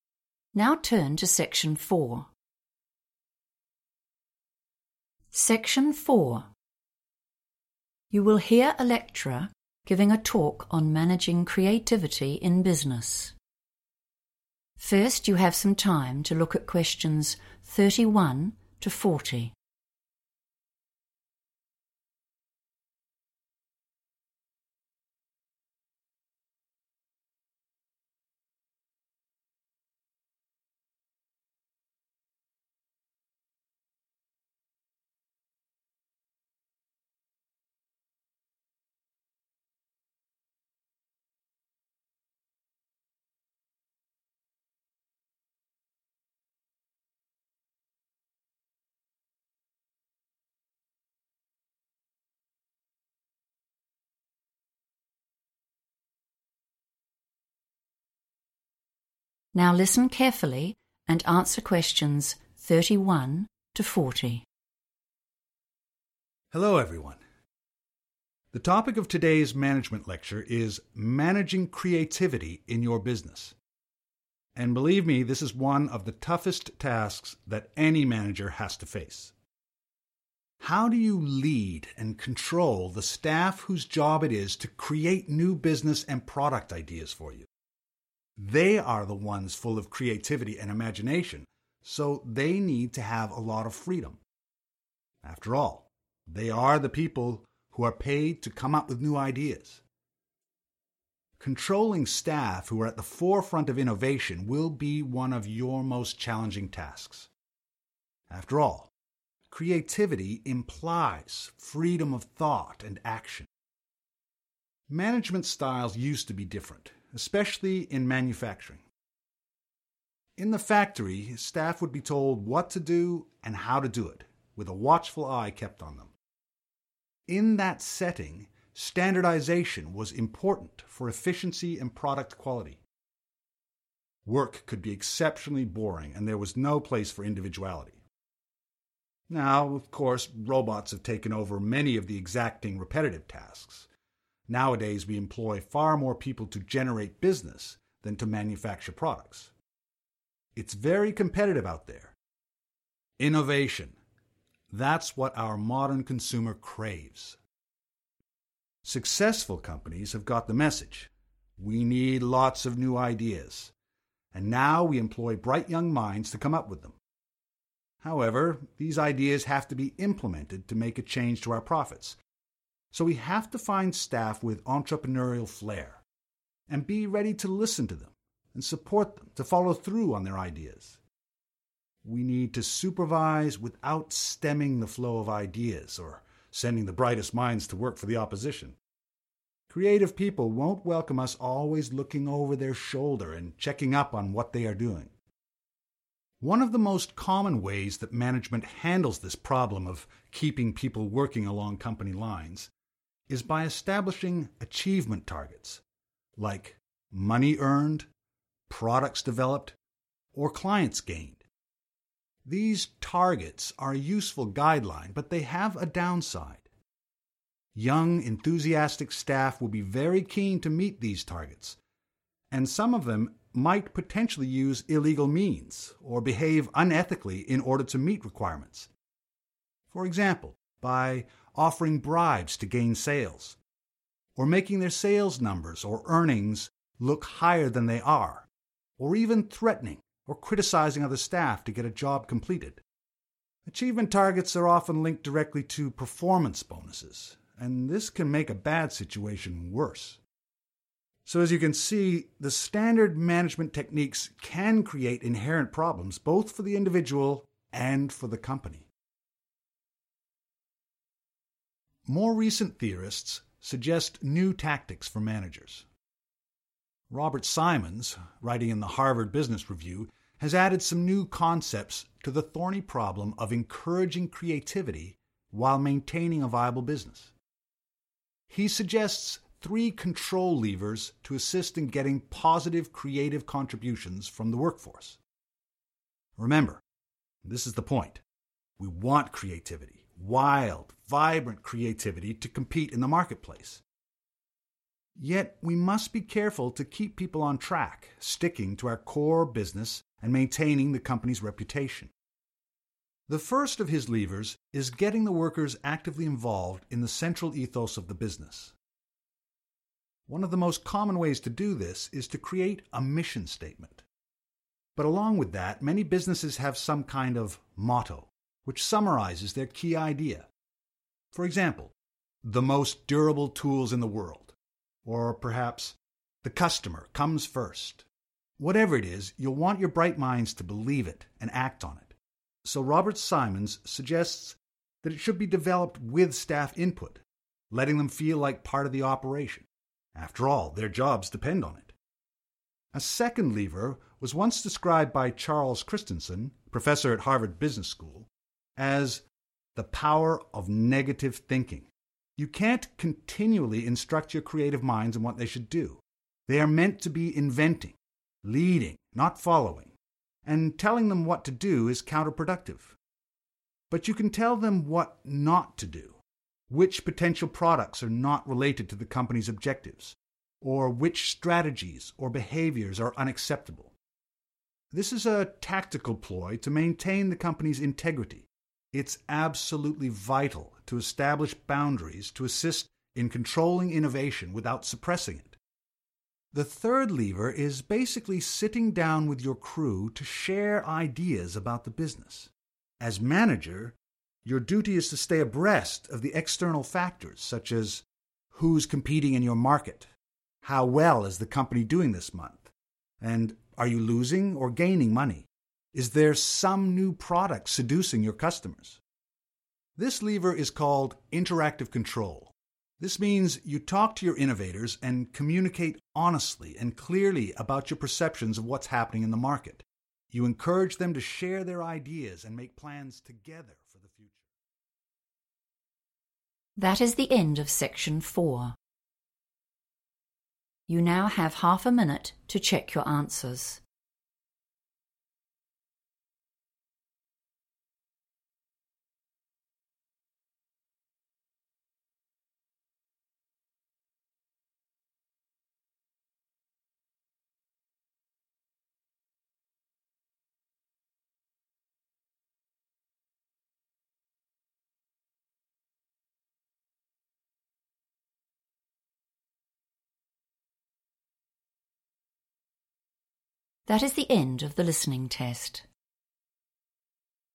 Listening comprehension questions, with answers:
Complete the summary below. Write NO MORE THAN TWO WORDS AND/OR A NUMBER for each answer.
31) They have creativity and _____ , so they need freedom.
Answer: imagination

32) In the past, in factories, _____ was vital for making a high quality product.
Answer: standardisation / standardization

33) But, their new ideas must be _____ if we want to make money from them.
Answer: implemented

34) A standard method for managing staff is setting _____ targets, related to profits, products or new clients.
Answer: achievement

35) These goals are often tied in to _____ and this can make the problem worse.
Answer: performance bonuses

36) Robert Simons' Three _____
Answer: control levers

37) Follow the company _____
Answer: motto

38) The power of _____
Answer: negative thinking

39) You need to set _____ to help control creativity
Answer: boundaries

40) _____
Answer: interactive control

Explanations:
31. The correct answer is 'imagination' because the lecturer describes creative staff as being 'full of creativity and imagination' and explains that this is why they 'need to have a lot of freedom.' The summary follows this same sentence structure, linking creativity and the missing word as reasons for needing freedom.
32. The correct answer is 'standardisation' because the lecturer explains that in an old factory setting, this was the key to 'efficiency and product quality.' The summary uses the phrase 'high quality product,' which matches the meaning of 'product quality' in the transcript. In the past, managers wanted everyone to do things the exact same way to ensure the items produced were of a certain standard.
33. The correct answer is 'implemented' because the speaker explains that having new ideas is not enough; a company must actually use those ideas to increase its earnings. In the recording, the lecturer says ideas must be 'implemented' to change 'profits,' which is a synonym for 'money' used in the summary task.
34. The correct answer is correct because the lecturer explains that a very usual or standard way for bosses to manage their workers is by creating goals for them to reach. He uses the words 'establishing achievement targets' to describe these goals, which helps the company see how well the staff are doing in areas like making money or finding new customers.
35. The correct answer is derived from the section of the talk discussing "achievement targets." The lecturer explains that these goals are often "linked directly" to extra money rewards, which are called performance bonuses. The transcript notes that this connection can "make a bad situation worse" because employees might act dishonestly just to get the extra money. Keywords like "linked" in the transcript match "tied in to" in the summary.
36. The correct answer is "control levers" because the lecturer introduces Robert Simons' ideas by stating that he added new concepts to help with the problem of managing creativity. Specifically, the lecturer mentions that Simons suggests "three other control levers" to help get good work from employees. The table is organized around these three points, so the title for the group of three is "control levers". Keywords to look for are "Robert Simons", "three", and "levers".
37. The correct answer is 'motto' because the lecturer explains that businesses use both a mission statement and a 'motto' to summarize their core values. The text provides specific examples of these mottos, such as 'the most durable tools in the world,' which align with the examples provided in the table question.
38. The correct answer is found in the section where the lecturer discusses the second method for managing innovation. He refers to it by the specific name "the power of negative thinking." This strategy involves telling staff what they are not allowed to do, rather than giving them strict orders on what to do, which helps keep them focused without stopping their creativity. Keywords like "second lever" and "described by" link the name directly to the question.
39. The correct answer is "boundaries" because the lecturer discusses the second way to manage creative employees. Instead of giving them strict orders, managers should tell them what behaviors or products are not allowed. By setting these specific limits or "boundaries," a company can manage new ideas (innovation) while still giving workers freedom.
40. The correct answer is found in the final part of the lecture where the speaker describes the ideas of Robert Simons. After explaining the first two 'levers' (or tools) for management, the lecturer introduces a third one. This third method involves managers sitting down with their team to talk about the market and competition. The transcript directly states that this specific method or lever is named 'interactive control'.

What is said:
Lecturer: Hello everyone. The topic of today's management lecture is "Managing Creativity in Your Business", and believe me, this is one of the toughest tasks that any manager has to face. How do you lead and control the staff whose job it is to create new business and product ideas for you? They are the ones full of creativity and imagination, so they need to have a lot of freedom – after all they are the people who are paid to come up with new ideas! Controlling staff who are at the forefront of innovation will be one of your most challenging tasks. After all, creativity implies freedom of thought and action.
Management styles used to be different, especially in manufacturing. In the factory, staff would be told what to do and how to do it – with a watchful eye kept on them. In that setting, standardisation was important for efficiency and product quality. Work could be exceptionally boring and there was no place for individuality. Now, of course, robots have taken over many of the exacting, repetitive tasks. Nowadays, we employ far more people to generate business than to manufacture products. It's very competitive out there. Innovation – that's what our modern consumer craves.
Successful companies have got the message – we need lots of new ideas, and now we employ bright young minds to come up with them. However, these ideas have to be implemented to make a change to our profits! So we have to find staff with entrepreneurial flair, and be ready to listen to them and support them to follow through on their ideas. We need to supervise without stemming the flow of ideas, or sending the brightest minds to work for the opposition. Creative people won't welcome us always looking over their shoulder and checking up on what they're doing.
One of the most common ways that management handles this problem of keeping people working along company lines, is by establishing achievement targets, like money earned, products developed, or clients gained. These targets are a useful guideline, but they have a downside. Young enthusiastic staff will be very keen to meet these targets, and some of them might potentially use illegal means or behave unethically in order to meet requirements — for example, by offering bribes to gain sales, or making their sales numbers or earnings look higher than they are, or even threatening or criticising other staff to get a job completed. Achievement targets are often linked directly to performance bonuses, and this can make a bad situation worse. So, as you can see, the standard management techniques can create inherent problems both for the individual and for the company.
More recent theorists suggest new tactics for managers. Robert Simons, writing in the Harvard Business Review, has added some new concepts to the thorny problem of encouraging creativity while maintaining a viable business. He suggests three other control levers to assist in getting positive creative contributions from the workforce. Remember – this is the point – we want creativity, wild, vibrant creativity to compete in the marketplace – yet we must be careful to keep people on track, sticking to our core business and maintaining the company's reputation.
The first of his levers is getting the workers actively involved in the central ethos of the business. One of the most common ways to do this is to create a mission statement, but along with that, many businesses have some kind of motto, which summarises their key idea; for example, 'the most durable tools in the world' or perhaps 'the customer comes first'. Whatever it is, you'll want your bright minds to believe it and act on it, so Robert Simons suggests that it should be developed with staff input – letting them feel like part of the operation. After all, their jobs depend on it!
A second lever was once described by Charles Christenson, Professor at Harvard Business School, as "the power of negative thinking". You can't continually instruct your creative minds in what they should do. They are meant to be inventing, leading, not following, and telling them what to do is counter-productive. But you can tell them what not to do; which potential products are not related to the company's objectives, or which strategies or behaviours are unacceptable. This is a tactical ploy to maintain the company's integrity. It's absolutely vital to establish boundaries to assist in controlling innovation without suppressing it.
The third lever is basically sitting down with your crew to share ideas about the business. As manager, your duty is to stay abreast of the external factors such as: Who's competing in your market? How well is the company doing this month, and are you losing or gaining money? Is there some new product seducing your customers?
This lever is called 'interactive control'. This means you talk to your innovators, and communicate honestly and clearly about your perceptions of what's happening in the market. You encourage them to share their ideas, and make plans together for the future.
That is the end of section 4. You now have half a minute to check your answers.
That is the end of the listening test.